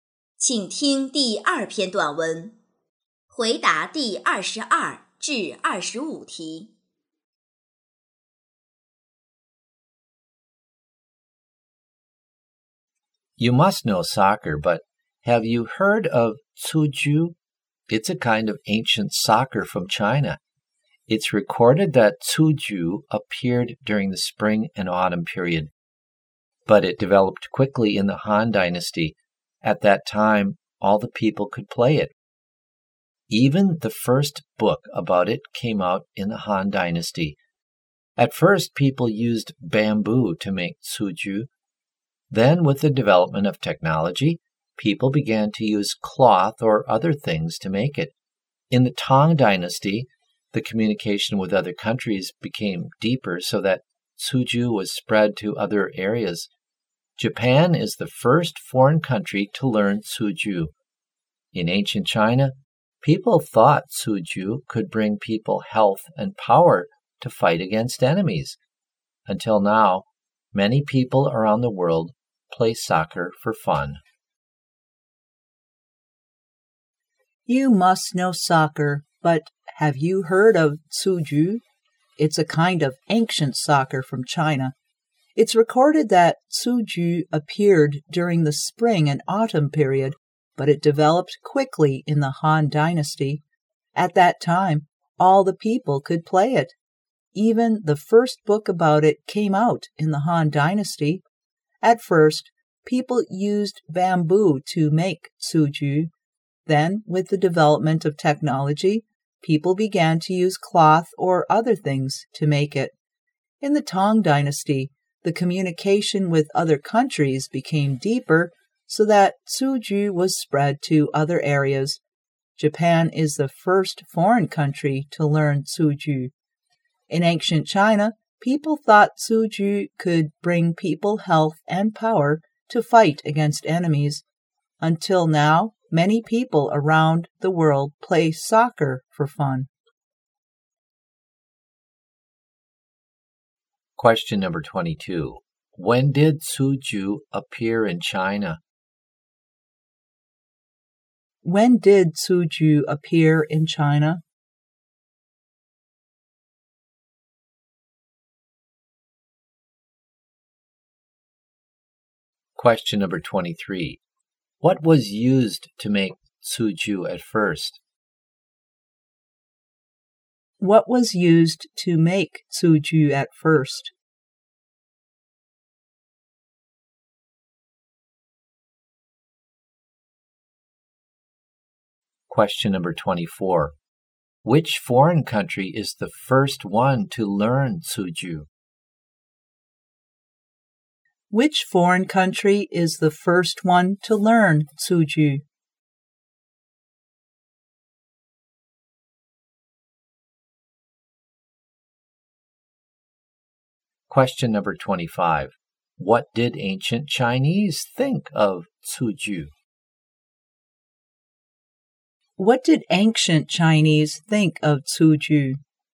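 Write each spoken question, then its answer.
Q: When did Cuju appear in China?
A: During the Spring and Autumn period

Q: What was used to make Cuju at first?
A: Bamboo

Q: Which foreign country is the first one to learn Cuju?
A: Japan

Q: What did ancient Chinese think of Cuju?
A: It could bring people health and power to fight against enemies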